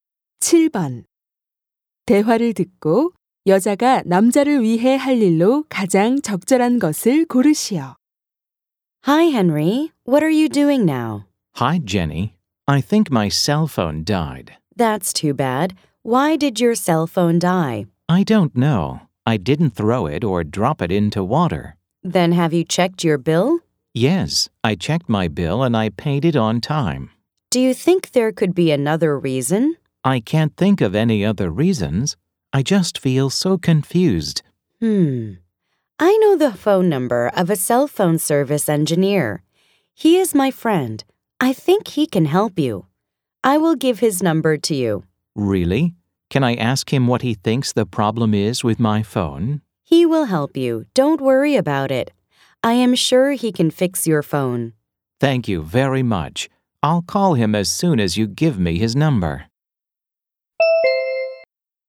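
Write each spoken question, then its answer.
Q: 대화를 듣고 여자가 남자를 위해 할 일로 가장 적절한 것을 고르시오.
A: 휴대전화 수리 기사 친구의 전화번호 알려 주기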